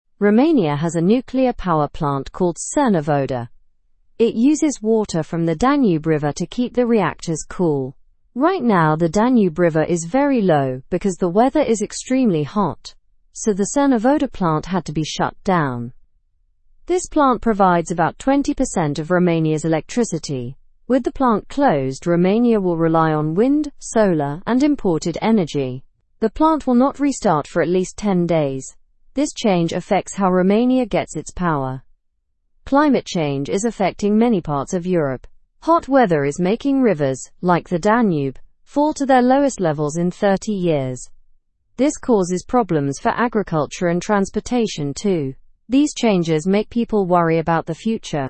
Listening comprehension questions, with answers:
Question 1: What is the name of Romania's nuclear power plant?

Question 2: Why did the Cernavodă plant have to be shut down?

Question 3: What percentage of Romania's electricity does the plant provide?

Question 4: What energy sources will Romania rely on with the plant closed?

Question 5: How long will the Cernavodă plant remain closed?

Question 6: What is causing the Danube River to have low water levels?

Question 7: How is climate change impacting Europe, according to the article?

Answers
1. The name is Cernavodă.
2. It was shut down because the Danube River water level was too low.
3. The plant provides about 20% of Romania's electricity.
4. Romania will rely on wind, solar, and imported energy.
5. It will be closed for at least 10 days.
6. Extremely hot weather is causing low water levels.
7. It is causing hot weather and rivers to fall to their lowest levels in 30 years.

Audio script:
Romania has a nuclear power plant called Cernavodă. It uses water from the Danube River to keep the reactors cool. Right now, the Danube River is very low because the weather is extremely hot. So, the Cernavodă plant had to be shut down.
This plant provides about 20% of Romania's electricity. With the plant closed, Romania will rely on wind, solar, and imported energy. The plant will not restart for at least 10 days. This change affects how Romania gets its power.
Climate change is affecting many parts of Europe. Hot weather is making rivers, like the Danube, fall to their lowest levels in 30 years. This causes problems for agriculture and transportation too. These changes make people worry about the future.

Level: Level 2